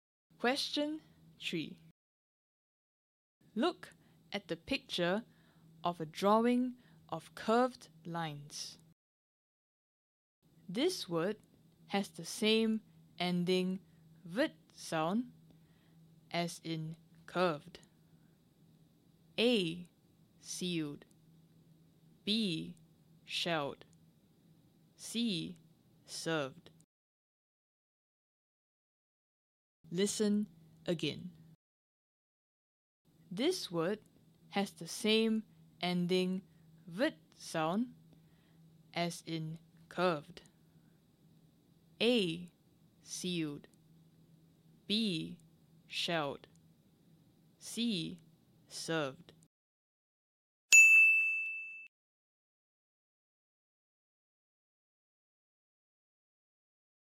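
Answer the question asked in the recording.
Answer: C: Served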